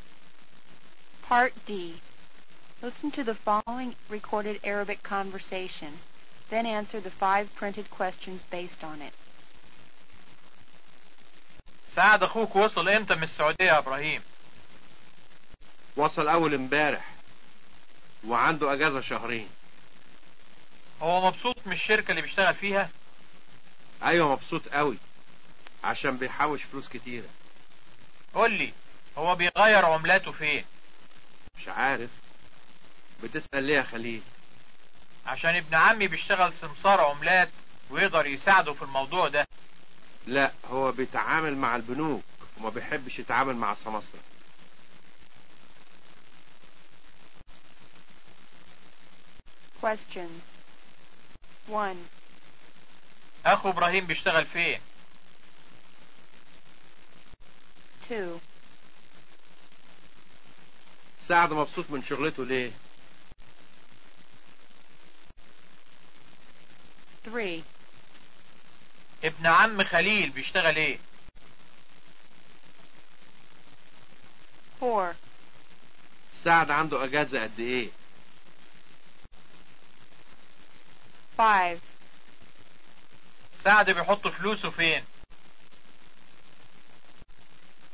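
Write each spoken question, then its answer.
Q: أخو إبراهيم بيشتغل فين؟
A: في شركة في السعودية

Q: سعد مبسوط من شغلته ليه؟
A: عشان بيحوش فلوس كتيرة

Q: ابن عم خليل بيشتغل ايه؟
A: سمسار عملات

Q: سعد عنده أجازة قد ايه؟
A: شهرين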